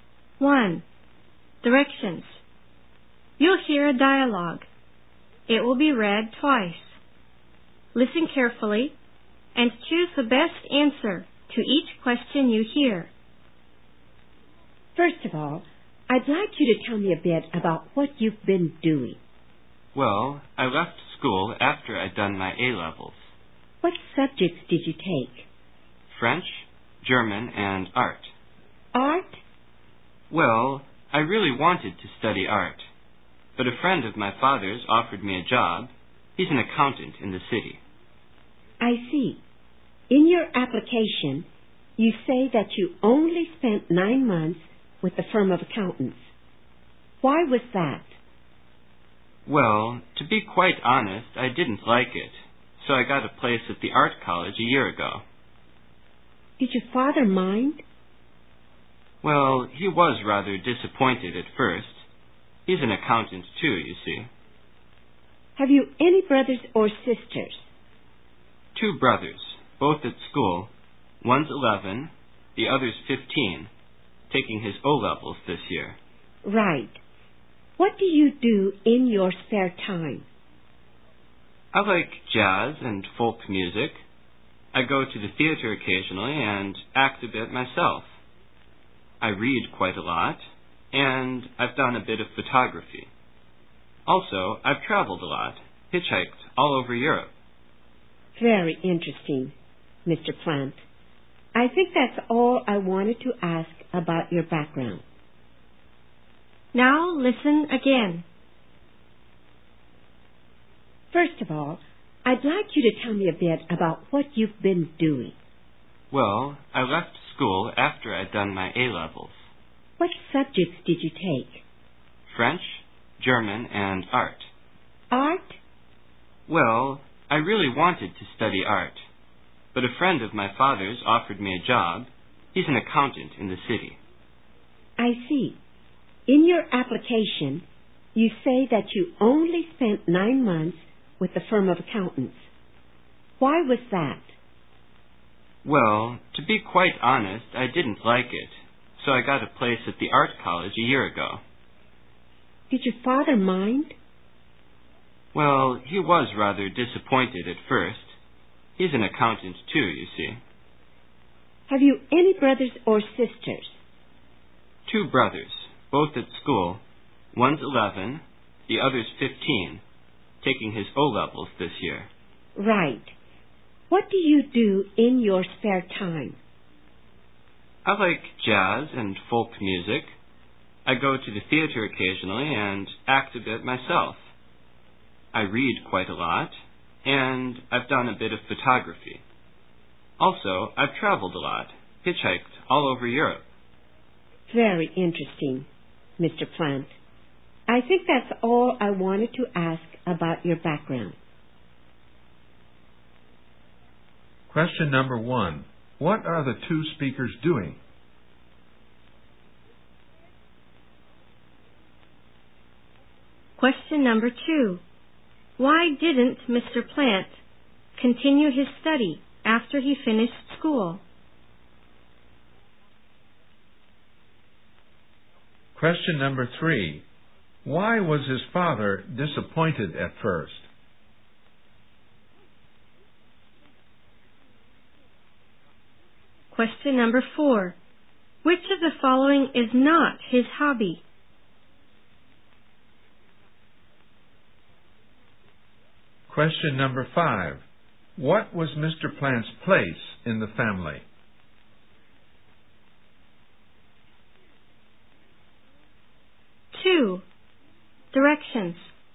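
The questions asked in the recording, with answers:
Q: What are the 2 speakers doing?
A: Having a job interview

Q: Plant continue his study after he finished school?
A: A friend of his father's offered him a job

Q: Why was his father disappointed at first?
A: Because he left the accountants' firm to study art (his father is an accountant)

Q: Plant's place in the family?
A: The eldest of three boys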